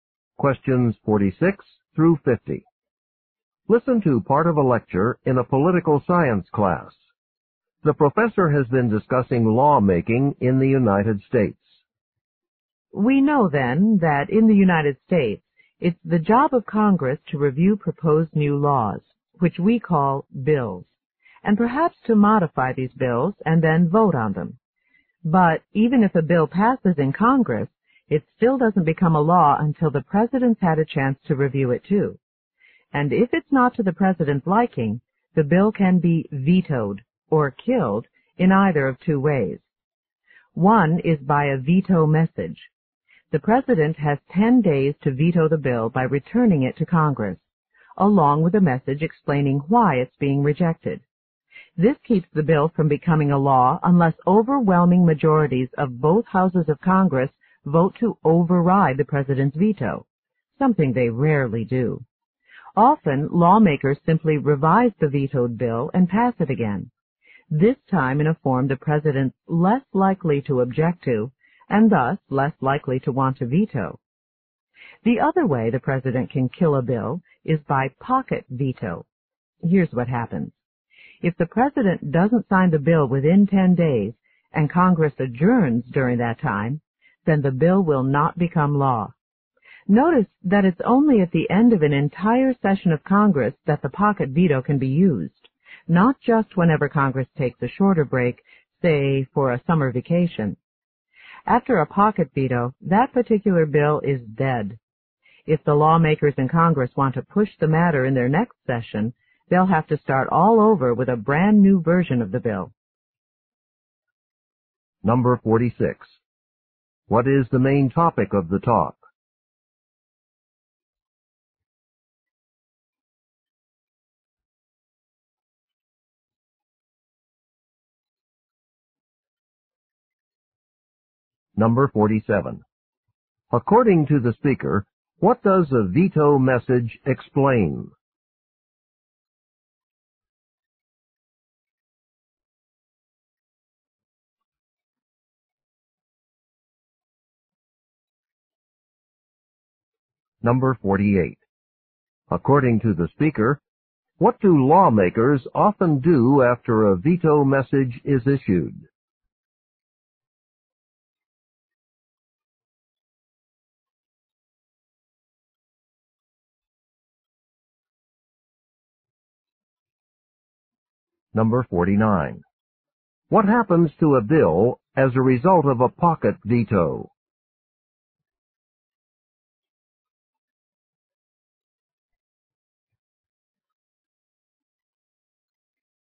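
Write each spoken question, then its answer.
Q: What is the main topic of the talk?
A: How the president can veto bills

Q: According to the speaker, what does a veto message explain?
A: Why the president rejected the bill

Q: According to the speaker, what do lawmakers often do after a veto message is issued?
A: Revise the bill and pass it again

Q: What happens to a bill as a result of a pocket veto?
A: It is dead; a new version must be started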